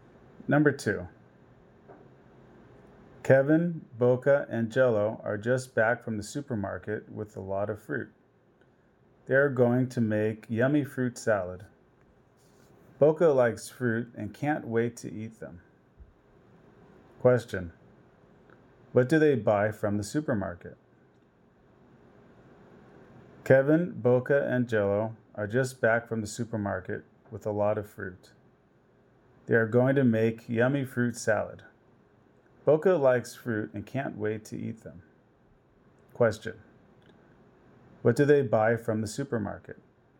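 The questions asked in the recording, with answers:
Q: Question, what do they buy from the supermarket?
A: A lot of fruit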